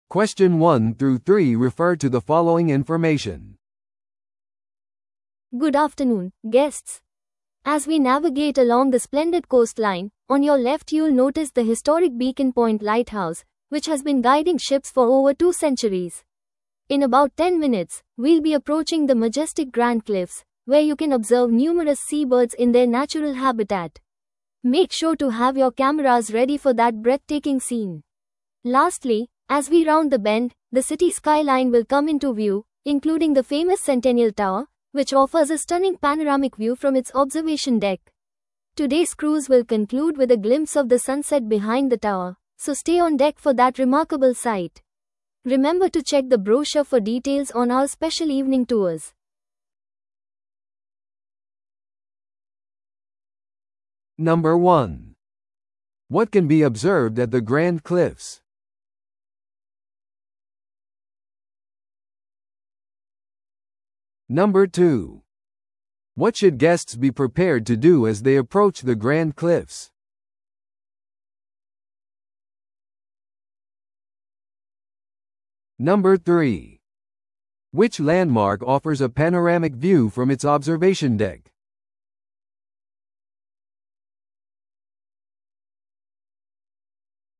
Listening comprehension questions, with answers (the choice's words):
Listen to the audio below and answer the questions.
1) What can be observed at the Grand Cliffs?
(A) 市街のスカイライン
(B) ビーコンポイント灯台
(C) 海鳥の自然生息地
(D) センテニアルタワーの後ろの夕日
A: 海鳥の自然生息地

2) What should guests be prepared to do as they approach the Grand Cliffs?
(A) イブニングツアーのパンフレットを確認する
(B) 閉会の光景のためにデッキにいる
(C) 景色をカメラに収める準備をする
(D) 下船する際の指示を聞く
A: 景色をカメラに収める準備をする

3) Which landmark offers a panoramic view from its observation deck?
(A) ビーコンポイント灯台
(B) センテニアルタワー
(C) グランドクリフス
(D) 市の歴史的な港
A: センテニアルタワー

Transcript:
Good afternoon, guests. As we navigate along the splendid coastline, on your left you'll notice the historic Beacon Point Lighthouse, which has been guiding ships for over two centuries. In about ten minutes, we'll be approaching the majestic Grand Cliffs, where you can observe numerous seabirds in their natural habitat. Make sure to have your cameras ready for that breathtaking scene. Lastly, as we round the bend, the city skyline will come into view, including the famous Centennial Tower, which offers a stunning panoramic view from its observation deck. Today's cruise will conclude with a glimpse of the sunset behind the tower, so stay on deck for that remarkable sight. Remember to check the brochure for details on our special evening tours.